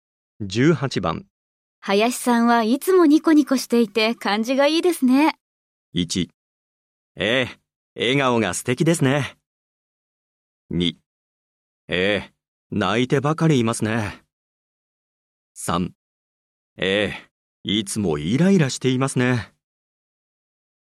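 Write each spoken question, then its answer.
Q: 林さんはいつもニコニコしていて感じがいいですね。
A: 1: ええ、笑顔が素敵ですね。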